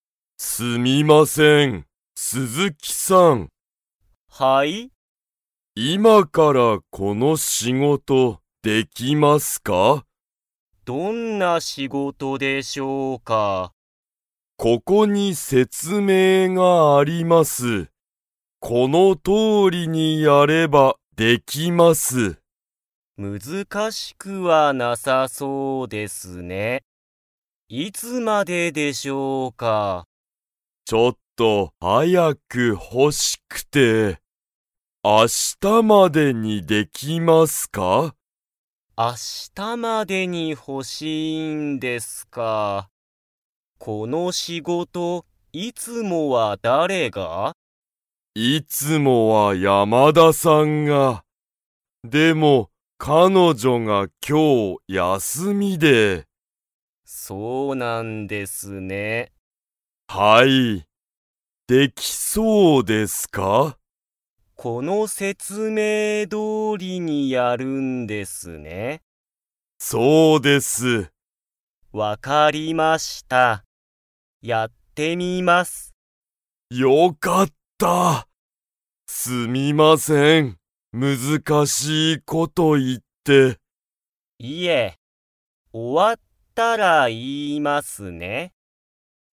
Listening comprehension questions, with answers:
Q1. 鈴木(すずき)さんは、その仕事(しごと)をやってみますか?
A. はい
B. いいえ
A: はい

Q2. 山田(やまだ)さんは、今日(きょう)____。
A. 仕事(しごと)をする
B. 休(やす)みだ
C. 説明(せつめい)したい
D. 会社(かいしゃ)にいる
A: 休(やす)みだ

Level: Level 2

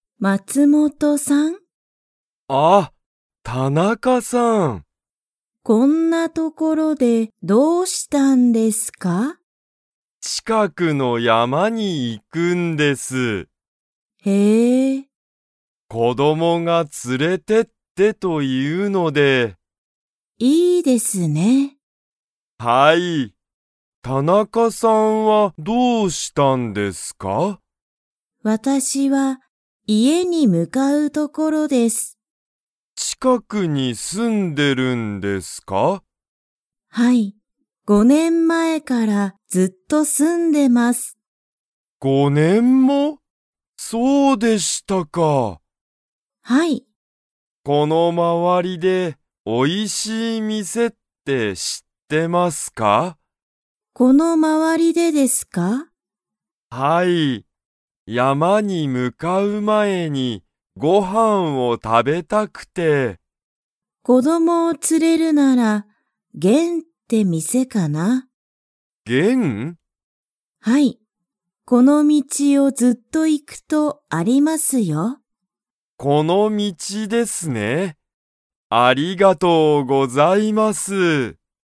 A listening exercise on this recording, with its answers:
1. 松本(まつもと)さんは____と近(ちか)くの山(やま)に行(い)く。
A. 田中(たなか)さん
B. 会社(かいしゃ)の人(ひと)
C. 子供(こども)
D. 友達(ともだち)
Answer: 子供(こども)

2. 田中(たなか)さんは、このまわりでおいしい店(みせ)を知(し)っていますか?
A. はい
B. いいえ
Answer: はい

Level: Level 2

